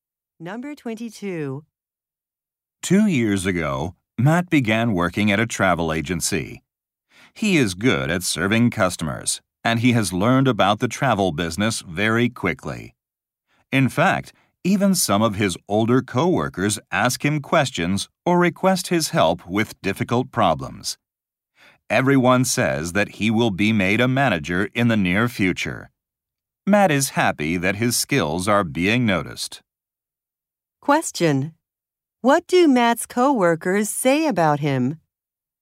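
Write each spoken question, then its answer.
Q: What do Matt's co-workers say about him?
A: He will soon become a manager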